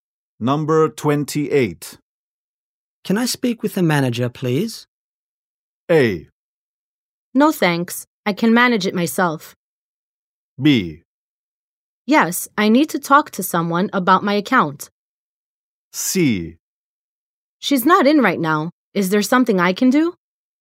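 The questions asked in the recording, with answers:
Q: Can I speak with the manager, please?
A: C: She's not in right now. Is there something I can do?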